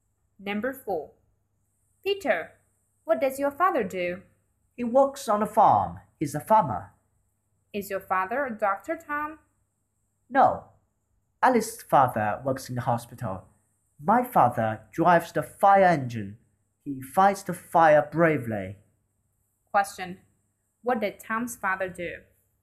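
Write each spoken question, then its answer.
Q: What did Tom's father do?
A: He is a fireman.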